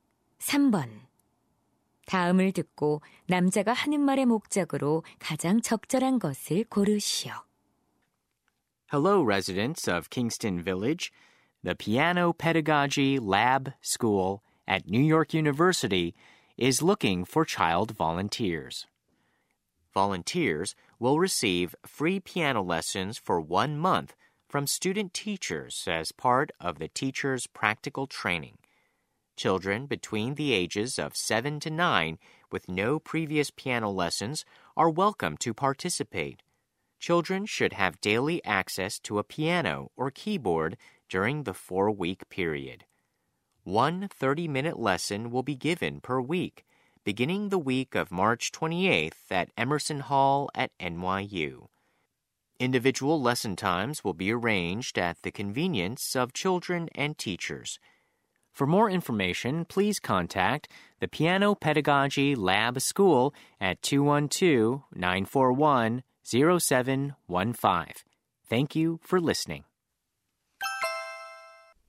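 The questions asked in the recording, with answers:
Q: 다음을 듣고 남자가 하는 말의 목적으로 가장 적절한 것을 고르시오.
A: 무료 피아노 레슨에 참여할 아동 자원자를 모집하려고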